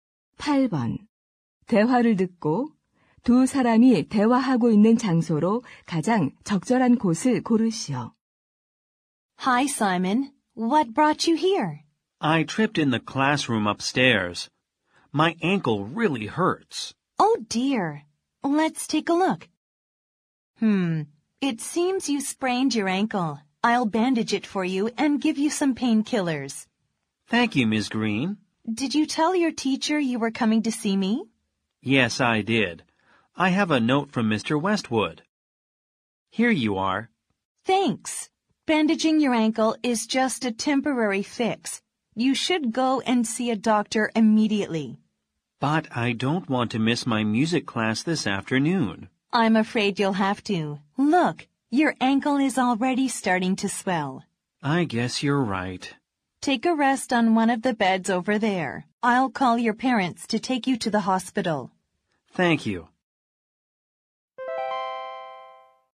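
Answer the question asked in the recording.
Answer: 학교 보건실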